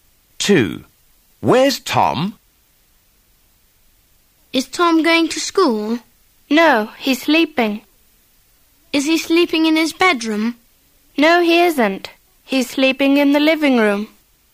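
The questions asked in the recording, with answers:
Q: Where's Tom?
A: Sleeping in the living room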